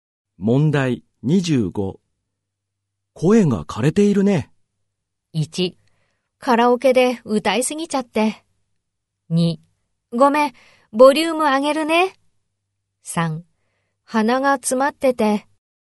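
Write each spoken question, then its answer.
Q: 声が枯れているね。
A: 1: カラオケで歌いすぎちゃって。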